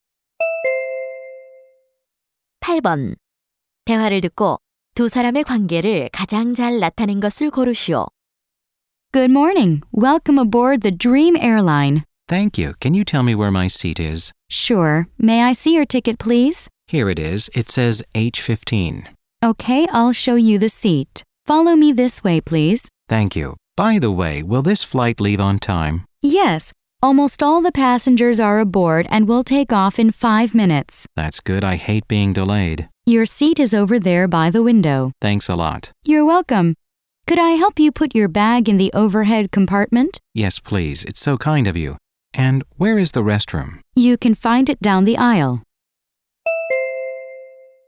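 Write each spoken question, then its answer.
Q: 대화를 듣고 두 사람의 관계를 가장 잘 나타낸 것을 고르시오.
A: 승무원과 승객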